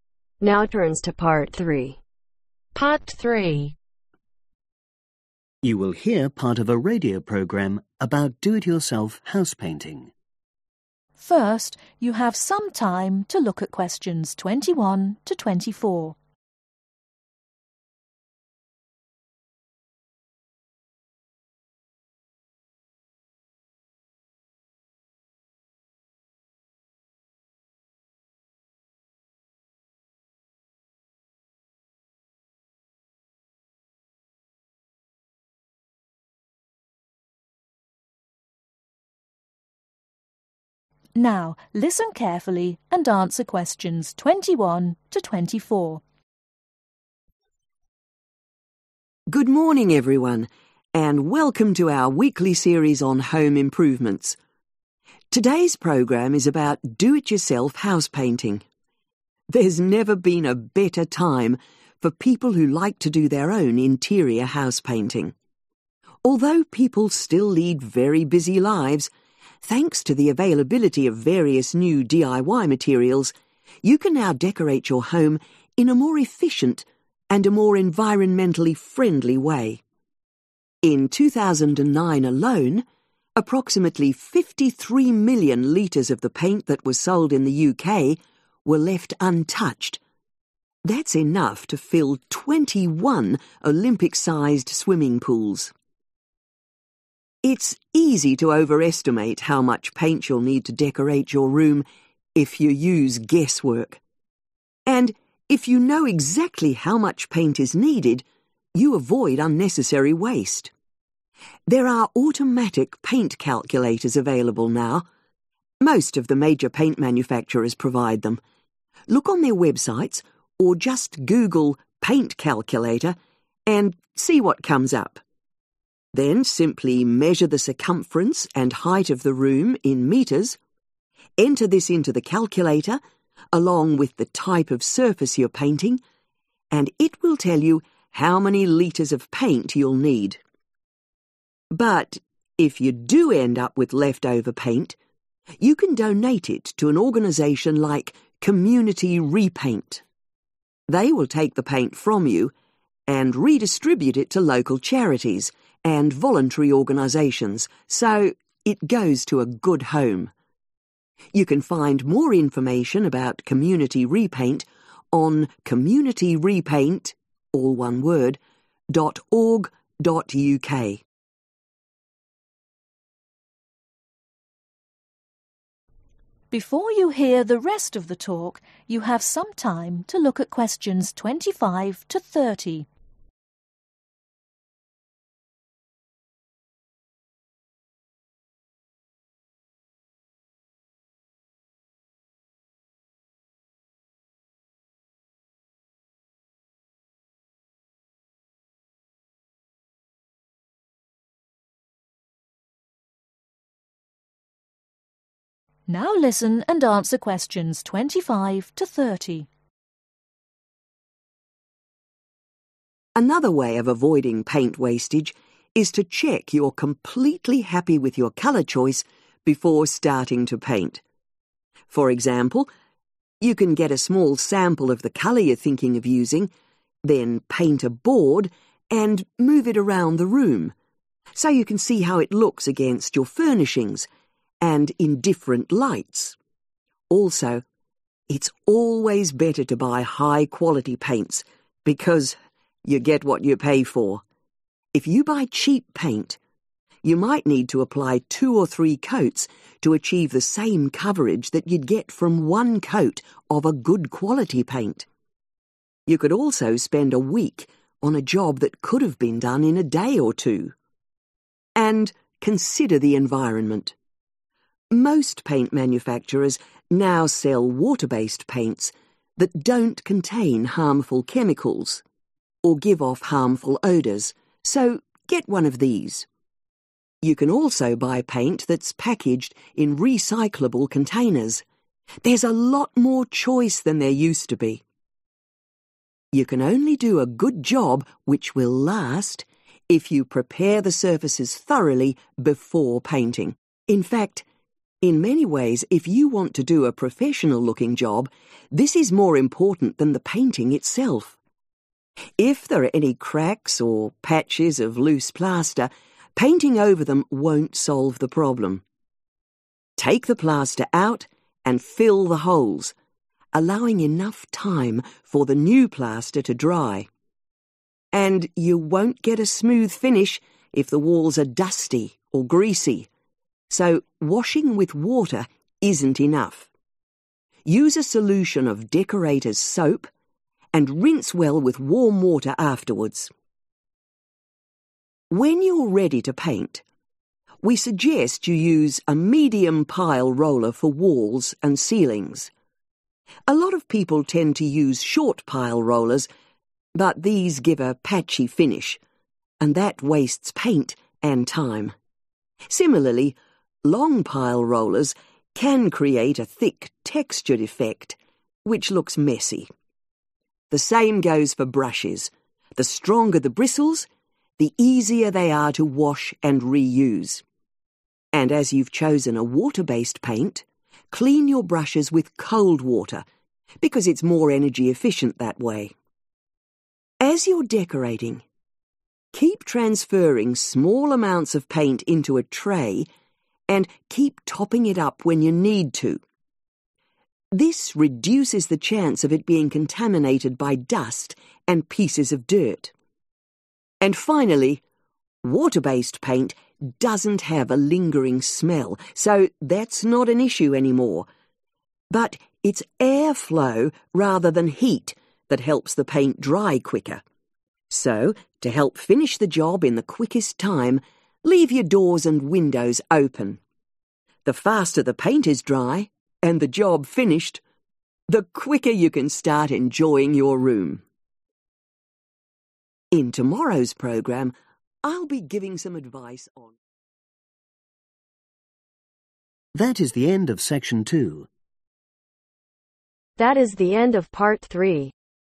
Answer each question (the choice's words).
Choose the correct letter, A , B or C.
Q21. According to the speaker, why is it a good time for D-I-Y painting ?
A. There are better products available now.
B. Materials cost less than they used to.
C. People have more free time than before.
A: There are better products available now.

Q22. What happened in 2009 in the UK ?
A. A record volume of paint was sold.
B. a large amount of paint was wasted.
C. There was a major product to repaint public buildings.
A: a large amount of paint was wasted.

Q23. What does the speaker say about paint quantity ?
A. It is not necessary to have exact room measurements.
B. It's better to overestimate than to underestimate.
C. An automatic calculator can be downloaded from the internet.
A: An automatic calculator can be downloaded from the internet.

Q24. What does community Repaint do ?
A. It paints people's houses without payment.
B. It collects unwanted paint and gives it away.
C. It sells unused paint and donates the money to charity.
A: It collects unwanted paint and gives it away.

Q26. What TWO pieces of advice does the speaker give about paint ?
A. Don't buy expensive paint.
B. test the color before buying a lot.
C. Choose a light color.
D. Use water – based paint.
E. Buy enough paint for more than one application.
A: Use water – based paint.